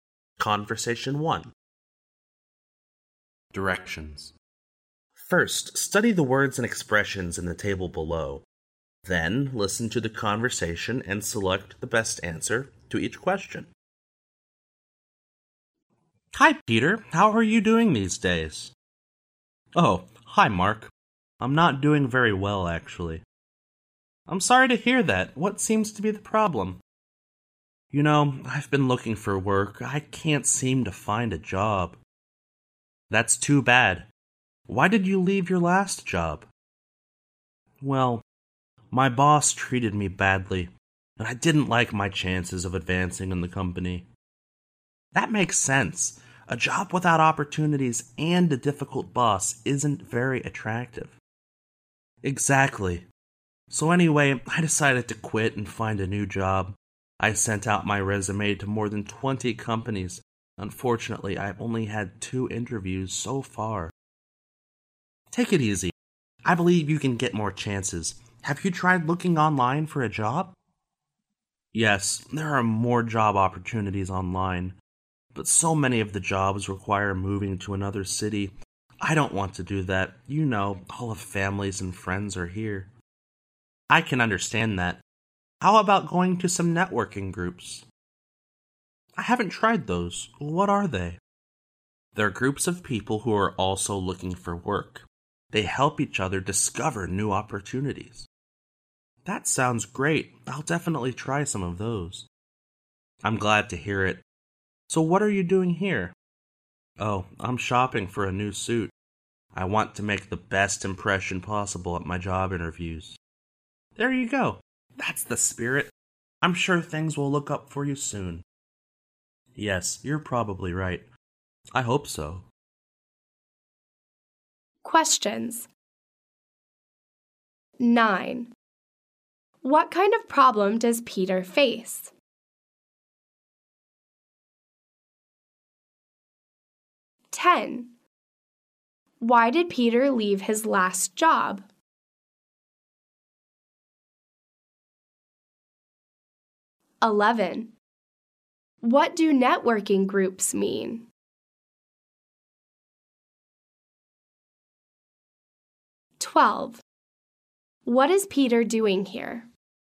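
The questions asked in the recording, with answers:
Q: What kind of problem does Peter face?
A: He can't find a job.

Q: Why did Peter leave his last job?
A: His boss treated him badly and he had little chance of advancing.

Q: What do networking groups mean?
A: Groups of job seekers who help each other discover new opportunities.

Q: What is Peter doing here?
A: Shopping for a new suit.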